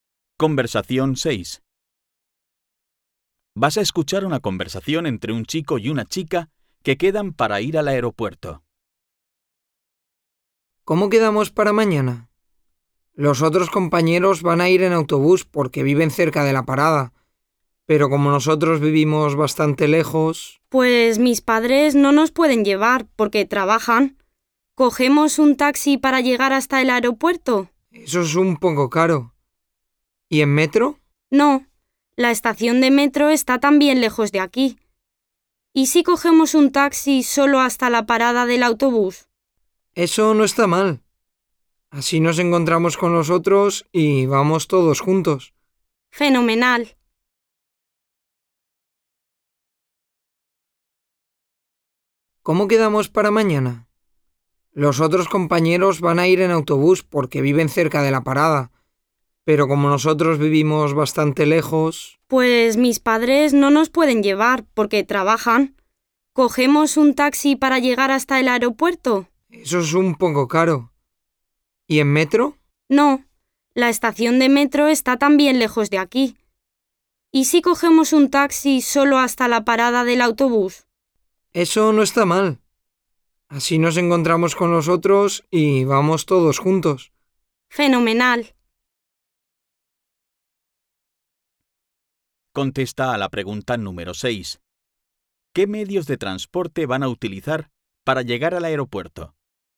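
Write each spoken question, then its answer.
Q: ¿Qué medios de transporte van a utilizar para llegar al aeropuerto?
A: Taxi y autobús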